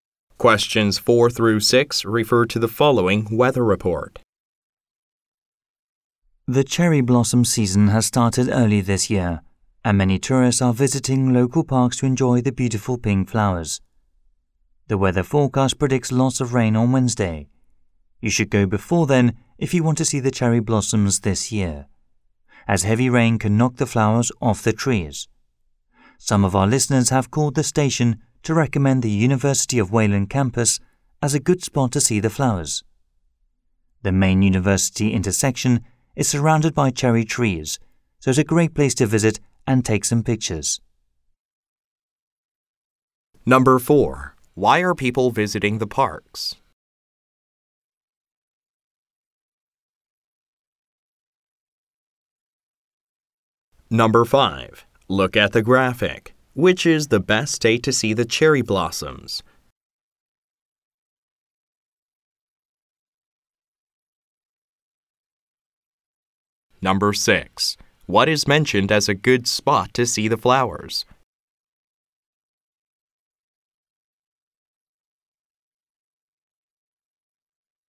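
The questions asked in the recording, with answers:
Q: Why are people visiting the parks?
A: To enjoy the cherry blossoms

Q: What is mentioned as a good spot to see the flowers?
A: The University of Wayland campus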